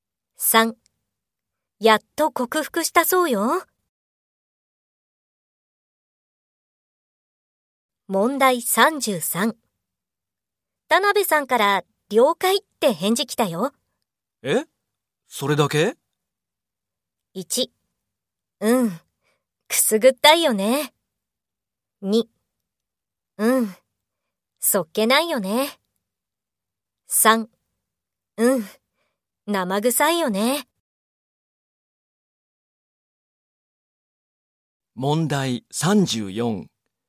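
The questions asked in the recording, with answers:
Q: 田辺さんから了解って返事来たよ。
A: 2: うん、そっけないよね。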